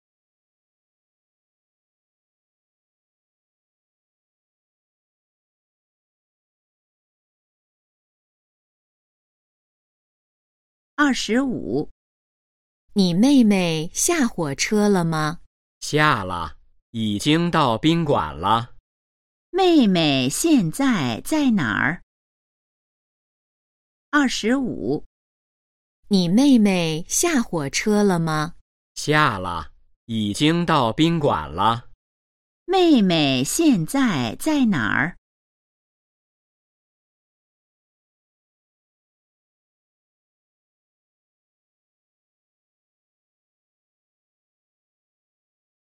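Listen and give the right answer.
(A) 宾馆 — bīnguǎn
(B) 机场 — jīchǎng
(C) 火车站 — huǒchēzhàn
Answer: (A) 宾馆 — bīnguǎn

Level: HSK2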